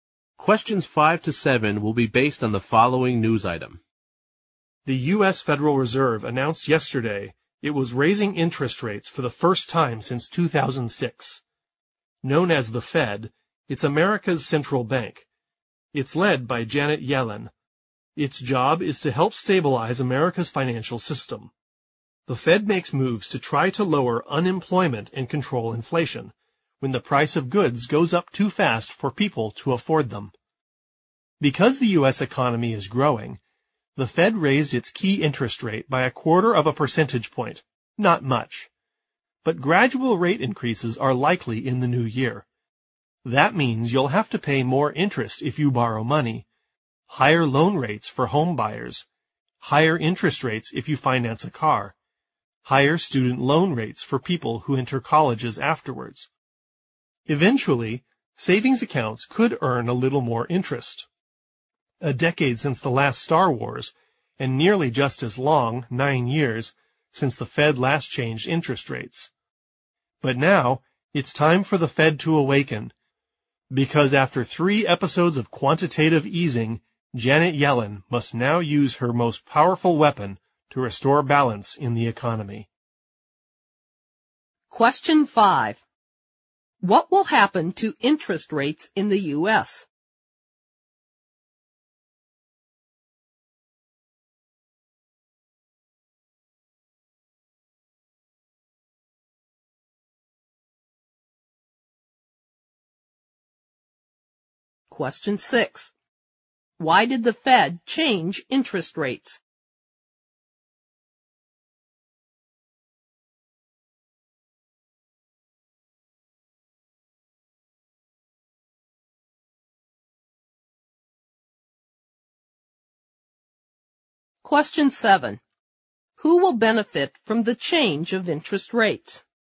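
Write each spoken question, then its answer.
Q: What will happen to interest rates in the U.S.?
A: They will rise gradually

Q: Why did the Fed change interest rates?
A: Because the U.S. economy is growing

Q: Who will benefit from the change of interest rates?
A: People with savings accounts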